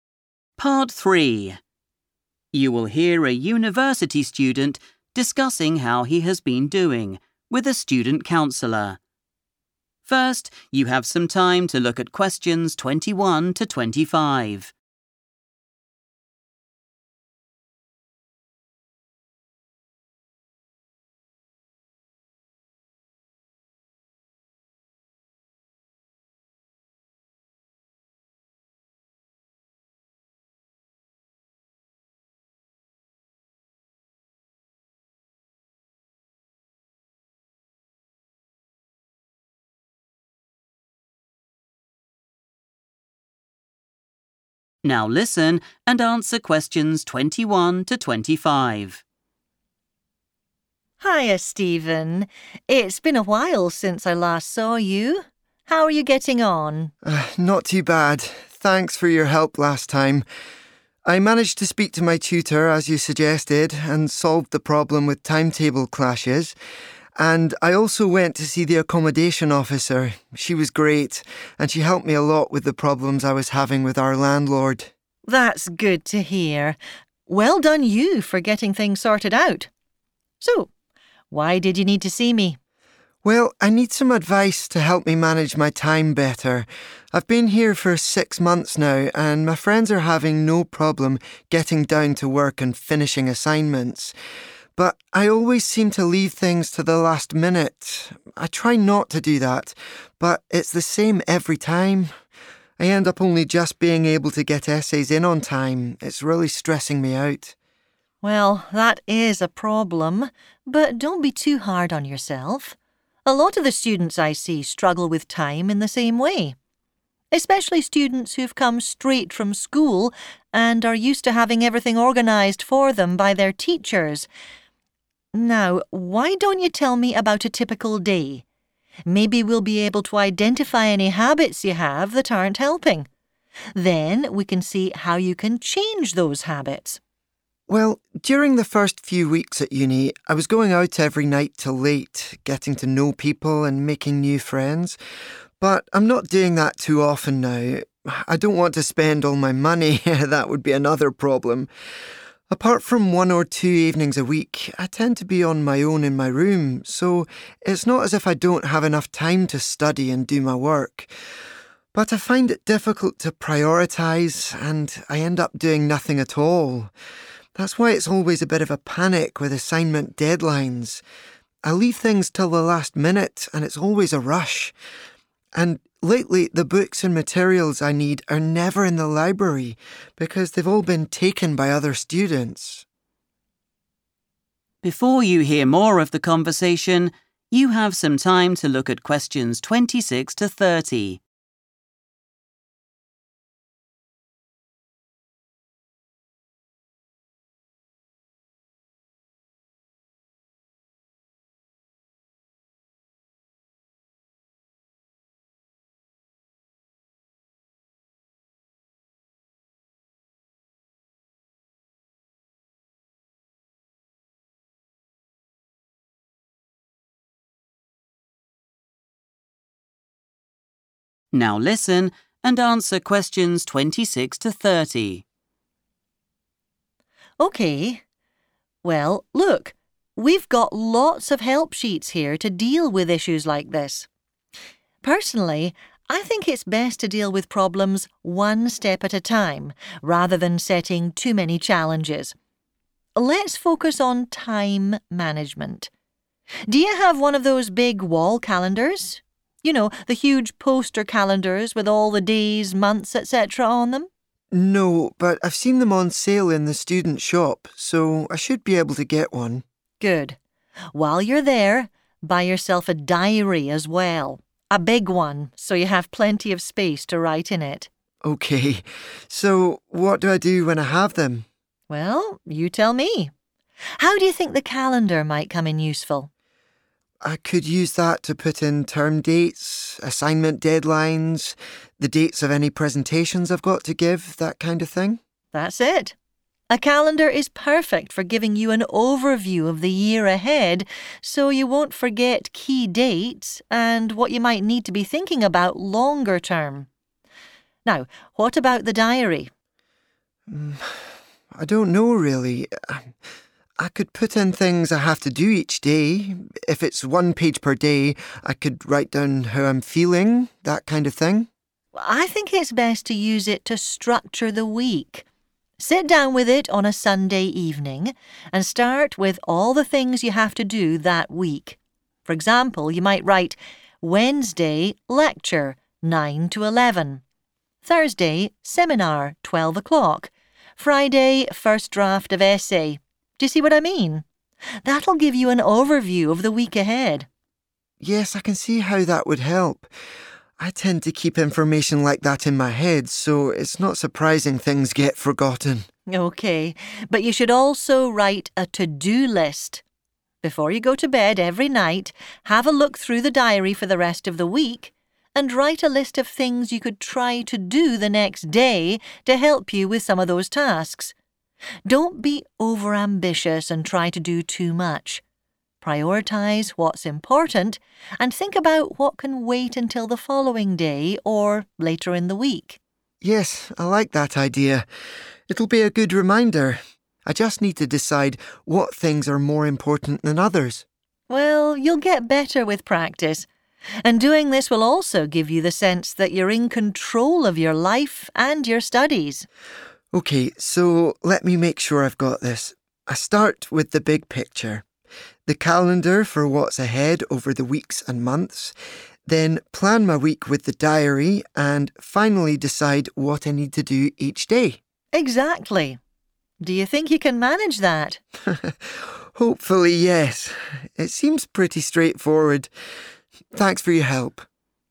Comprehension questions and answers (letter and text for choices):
Choose the correct letter, A, B or C.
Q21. What is Stephen's problem?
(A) He cannot finish assignments on time.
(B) He is not very organised.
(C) His friends are getting better results than him.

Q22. The counsellor believes that some students at university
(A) are not used to taking responsibility for their studies.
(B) often need more help from their teachers.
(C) find it difficult to ask for help.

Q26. It will provide an _____ of the year.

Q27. Diary. Get one with _____ per day.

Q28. Use this to _____ the week.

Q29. The best time to write in it is _____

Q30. Completing the tasks will make you feel _____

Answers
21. (B) He is not very organised.
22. (A) are not used to taking responsibility for their studies.
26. overview
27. one page
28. structure
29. Sunday evening
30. in control

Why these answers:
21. The correct answer is B because Stephen explains that he has trouble with "time management" and deciding which tasks are most important. This lack of planning is what being unorganized means. We can tell choice A is wrong because Stephen says he is able to get his essays in "on time," even though it is a stressful rush. Choice C is also wrong because he only says his friends start and finish work easily, not that they get better grades or "results."
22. The correct answer is A because the counsellor explains that many students who recently finished school have trouble managing their time. This is because their teachers used to organize everything for them in the past. Because they are used to someone else planning their day, they find it hard to take responsibility for their own studies and deadlines when they get to university.
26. The correct answer is "overview" because the counsellor explains that using a large wall calendar allows Stephen to see his whole year in one place. This helps him see the "big picture," including important dates and deadlines like presentations or end-of-term dates, so he can plan ahead. This matches the request for the purpose of the calendar in the table.
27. The correct answer is 'one page' because Stephen mentions this specific layout when discussing the size and utility of the diary he plans to buy. He suggests that if each day has its own page, he would have enough space to record his daily feelings and activities, which aligns with the counsellor's advice to get a 'big one' with plenty of space.
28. The correct answer is 'structure' because the counsellor suggests using a diary specifically to plan out the school week. By writing down lectures, seminars, and deadlines, the student can organize their time better and not forget things. The counsellor explicitly uses the word 'structure' when explaining the purpose of the diary for the week.
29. The correct answer is Sunday evening because the counselor suggests that this is the best time for Stephen to look at his diary and list all the activities he needs to complete during that week. By doing this planning at the end of the weekend, he can start the new week with a clear structure and avoid forgetting important deadlines or classes.
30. The correct answer is "in control" because the counsellor tells Stephen that practicing the new planning habits will lead to this feeling. Specifically, by using the calendar, diary, and to-do lists to manage his time, he will gain a sense of power over his schedule. Keywords such as "sense" and "give you" help identify the feeling he will experience.

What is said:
Counsellor: Hiya, Stephen. It's been a while since I last saw you. How are you getting on?
Stephen: Not too bad. Thanks for your help last time. I managed to speak to my tutor as you suggested and solved the problem with timetable clashes. And I also went to see the accommodation officer. She was great and she helped me a lot with the problems I was having with our landlord.
Counsellor: That's good to hear. Well done you for getting things sorted out. So, why did you need to see me?
Stephen: Well, I need some advice to help me manage my time better. I've been here for six months now and my friends are having no problem getting down to work and finishing assignments. But I always seem to leave things to the last minute. I try not to do that but it's the same every time. I end up only just being able to get essays in on time. It's really stressing me out.
Counsellor: Well, that is a problem, but don't be too hard on yourself. A lot of the students I see struggle with time in the same way. Especially students who've come straight from school and are used to having everything organised for them by their teachers. Now, why don't you tell me about a typical day? Maybe we'll be able to identify any habits you have that aren't helping. Then we can see how you can change those habits.
Stephen: Well, during the first few weeks at uni, I was going out every night till late, getting to know people and making new friends. But I'm not doing that too often now. I don't want to spend all my money - that would be another problem! Apart from one or two evenings a week, I tend to be on my own in my room so it's not as if I don't have enough time to study and do my work. But I find it difficult to prioritise and I end up doing nothing at all. That's why it's always a bit of a panic with assignment deadlines. I leave things till the last minute and it's always a rush. And lately, the books and materials I need are never in the library because they've all been taken by other students.
Counsellor: OK, well, look. We've got lots of help sheets here to deal with issues like this. Personally, I think it's best to deal with problems one step at a time rather than setting too many challenges. Let's focus on time management. Do you have one of those big wall calendars? You know, the huge poster calendars with all the days, months, etc. on them?
Stephen: No, but I've seen them on sale in the student shop so I should be able to get one.
Counsellor: Good. While you're there, buy yourself a diary as well, a big one, so you have plenty of space to write in it.
Stephen: OK, so what do I do when I have them?
How do you think the calendar might come in useful?
Stephen: I could use that to put in term dates, assignment deadlines, the dates of any presentations I've got to give, that kind of thing.
Counsellor: That's it. A calendar is perfect for giving you an overview of the year ahead so you won't forget key dates and what you might need to be thinking about longer term. Now, what about the diary?
Stephen: I don't know, really. I could put in things I have to do each day. If it's one page per day, I could write down how I'm feeling.
Counsellor: I think it's best to use it to structure the week. Sit down with it on a Sunday evening and start with all the things you have to do that week. For example, you might write: 'Wednesday, lecture, nine to eleven; Thursday, seminar, twelve o'clock; Friday, first draft of essay'. Do you see what I mean? That'll give you an overview of the week ahead.
Stephen: Yes, I can see how that would help. I tend to keep information like that in my head so it's not surprising things get forgotten.
Counsellor: OK, but you should also write a to-do list. Before you go to bed every night, have a look through the diary for the rest of the week and write a list of things you could try to do the next day to help you with some of those tasks. Don't be over-ambitious and try to do too much. Prioritizes what's important and think about what can wait until the following day or later in the week.
Stephen: Yes, I like that idea. It'll be a good reminder. I just need to decide what things are more important than others.
Counsellor: Well, you'll get better with practice, and doing this will also give you the sense that you're in control of your life and your studies.
Stephen: OK, so let me make sure I've got this. I start with the big picture, the calendar for what's ahead over the weeks and months, then plan my week with the diary, and finally decide what I need to do each day.
Counsellor: Exactly. Do you think you can manage that?
Stephen: Hopefully, yes. It seems pretty straightforward. Thanks for your help.